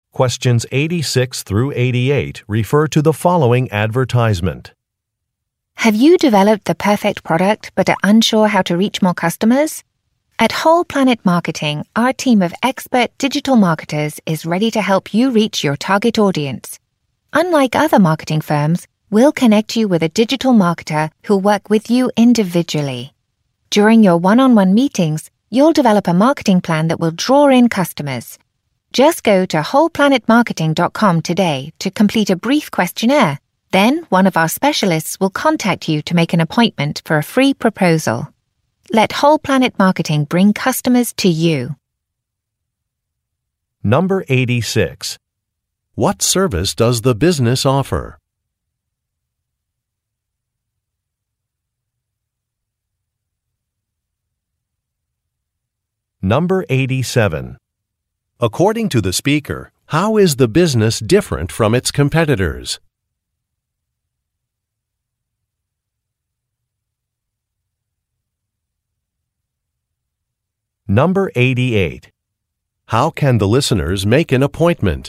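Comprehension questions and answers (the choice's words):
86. What service does the business offer?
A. Financial planning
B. Digital marketing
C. Real estate sales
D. International shipping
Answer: Digital marketing

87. According to the speaker, how is the business different from its competitors?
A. It has several local offices.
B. It offers a money-back guarantee.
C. Its employees have industry certification.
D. Its employees work one-on-one with clients.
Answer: Its employees work one-on-one with clients.

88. How can the listeners make an appointment?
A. By sending an e-mail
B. By calling customer service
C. By filling out a questionnaire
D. By sending a text message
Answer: By filling out a questionnaire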